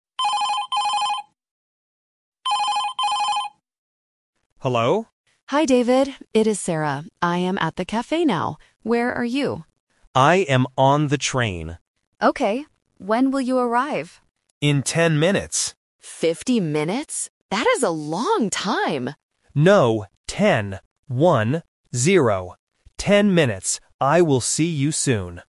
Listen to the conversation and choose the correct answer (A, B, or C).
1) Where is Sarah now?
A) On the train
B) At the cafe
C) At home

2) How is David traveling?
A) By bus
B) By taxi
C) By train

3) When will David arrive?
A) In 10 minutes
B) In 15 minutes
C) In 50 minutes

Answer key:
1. B
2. C
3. A

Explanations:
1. Sarah explicitly states at the beginning, "I am at the cafe now." Option (A) is a trap because it is David's location, not Sarah's. Option (C) is plausible but not mentioned.
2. David answers Sarah's question by saying, "I am on the train." Options (A) and (B) are distractors related to transport but are not in the audio.
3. David says he will arrive "In ten minutes." Option (C) is a trap because Sarah mishears him over the phone and asks "Fifty minutes?", but David corrects her immediately: "No, ten. One - zero." Option (B) is a common number distractor but is not mentioned.

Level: A1

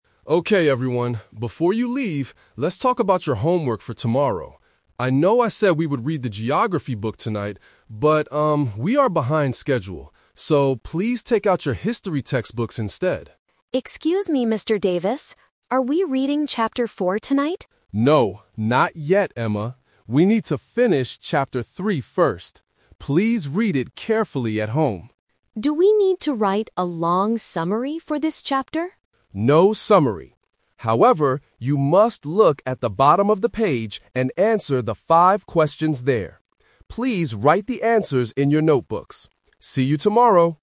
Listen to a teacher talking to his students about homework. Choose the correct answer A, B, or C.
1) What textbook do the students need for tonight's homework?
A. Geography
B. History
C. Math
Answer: B

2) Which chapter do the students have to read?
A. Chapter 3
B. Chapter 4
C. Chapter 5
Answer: A

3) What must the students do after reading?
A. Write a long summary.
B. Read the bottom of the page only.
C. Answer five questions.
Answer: C

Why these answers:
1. The teacher says, "please take out your History textbooks instead." Trap: Option A (Geography) is a trap. The teacher originally planned for Geography but used the word "But" to change the plan.
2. The teacher explicitly says, "We need to finish Chapter 3 first." Trap: Option B (Chapter 4) is a trap because the student asks about it, but the teacher says "No". Option C (Chapter 5) is a distractor using the number "five" from the "five questions" mentioned later.
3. The teacher instructs the students to "answer the five questions there." Trap: Option A is a trap because the student asks about writing a summary, but the teacher says "No summary. However...".

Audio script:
Mr. Davis: Okay everyone, before you leave, let's talk about your homework for tomorrow. I know I said we would read the Geography book tonight. But, um, we are behind schedule. So, please take out your History textbooks instead.
Emma: Excuse me, Mr. Davis. Are we reading Chapter 4 tonight?
Mr. Davis: No, not yet Emma. We need to finish Chapter 3 first. Please read it carefully at home.
Emma: Do we need to write a long summary for this chapter?
Mr. Davis: No summary. However, you must look at the bottom of the page and answer the five questions there. Please write the answers in your notebooks. See you tomorrow!

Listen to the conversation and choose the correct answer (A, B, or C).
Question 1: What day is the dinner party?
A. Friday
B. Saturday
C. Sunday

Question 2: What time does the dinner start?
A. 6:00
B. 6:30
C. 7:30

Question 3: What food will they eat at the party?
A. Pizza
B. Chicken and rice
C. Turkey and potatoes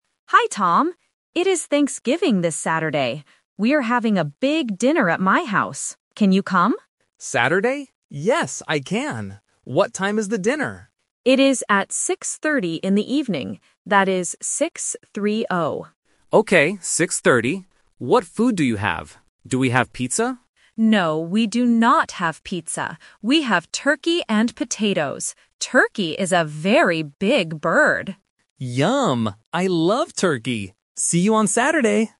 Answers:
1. B
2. B
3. C

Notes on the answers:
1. Anna says, "It is Thanksgiving this Saturday." Tom also repeats the word "Saturday" to confirm. Trap: Options (A) and (C) are days of the weekend but are not mentioned in the audio.
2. Anna says, "It is at 6:30 in the evening" and slowly says the numbers "6-3-0". Tom repeats "6:30". Trap: Options (A) and (C) use similar numbers, but they are incorrect.
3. Anna clearly says, "We have turkey and potatoes." Trap: Option (A) is a trap. Tom asks "Do we have pizza?", but Anna answers "No, we do not have pizza." Option (B) is not mentioned.

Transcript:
Anna: Hi, Tom. It is Thanksgiving this Saturday. We are having a big dinner at my house. Can you come?
Tom: Saturday? Yes, I can! What time is the dinner?
Anna: It is at 6:30 in the evening. That is 6-3-0.
Tom: Okay, 6:30. What food do you have? Do we have pizza?
Anna: No, we do not have pizza. We have turkey and potatoes. Turkey is a very big bird!

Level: A1

